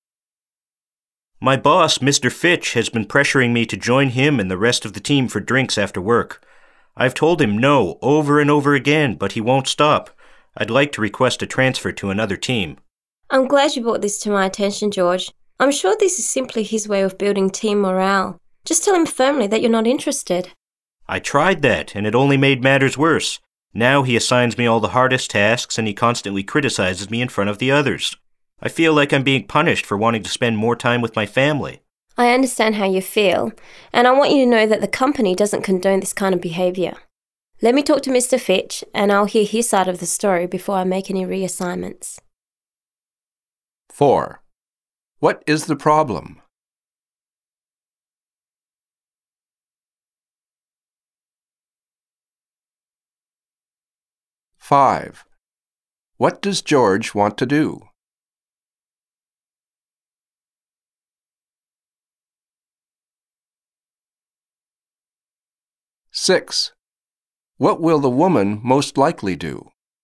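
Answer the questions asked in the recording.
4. George's boss keeps pressuring him to go for drinks after work and now punishes him for refusing
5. Transfer to another team
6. Talk to Mr. Fitch to hear his side of the story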